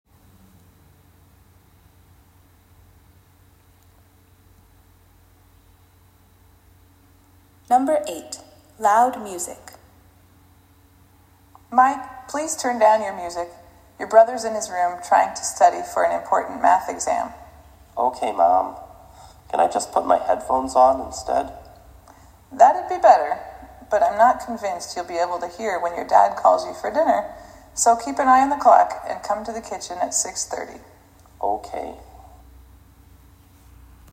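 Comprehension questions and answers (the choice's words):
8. How will the boy know when it is time for dinner?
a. His mother will call him.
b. He will watch the time.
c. His brother will tell him.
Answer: He will watch the time.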